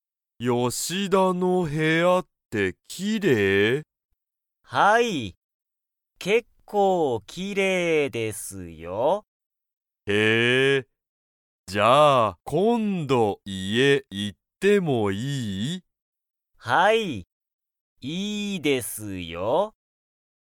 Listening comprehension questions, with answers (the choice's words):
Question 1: 吉田(よしだ)さんの部屋(へや)は、____。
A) 結構(けっこう)きれいだ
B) 結構高(けっこうたか)い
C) すごく新(あたら)しい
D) すごくたくさんだ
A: 結構(けっこう)きれいだ

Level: Level 1